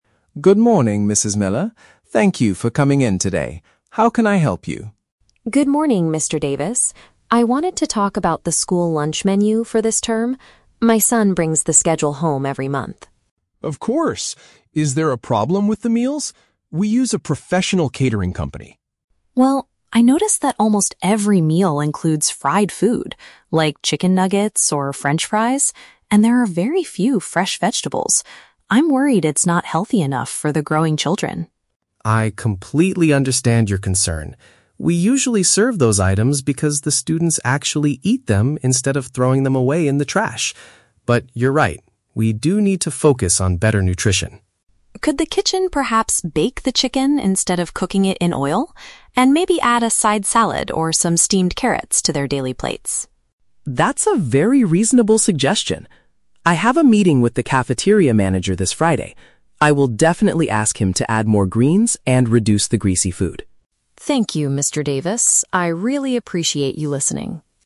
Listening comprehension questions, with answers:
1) Why is Mrs. Miller meeting with the principal?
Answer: To discuss the nutritional quality of the food provided to the students.

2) What is the principal's initial explanation for the current menu?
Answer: The children are more likely to finish those types of meals.

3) What does the principal promise to do next?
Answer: Speak to the person in charge of cooking about making changes.

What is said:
Mr. Davis: Good morning, Mrs. Miller. Thank you for coming in today. How can I help you?
Mrs. Miller: Good morning, Mr. Davis. I wanted to talk about the school lunch menu for this term. My son brings the schedule home every month.
Mr. Davis: Of course. Is there a problem with the meals? We use a professional catering company.
Mrs. Miller: Well, I noticed that almost every meal includes fried food, like chicken nuggets or french fries. And there are very few fresh vegetables. I'm worried it's not healthy enough for the growing children.
Mr. Davis: I completely understand your concern. We usually serve those items because the students actually eat them instead of throwing them away in the trash. But you're right, we do need to focus on better nutrition.
Mrs. Miller: Could the kitchen perhaps bake the chicken instead of cooking it in oil? And maybe add a side salad or some steamed carrots to their daily plates?
Mr. Davis: That's a very reasonable suggestion. I have a meeting with the cafeteria manager this Friday. I will definitely ask him to add more greens and reduce the greasy food.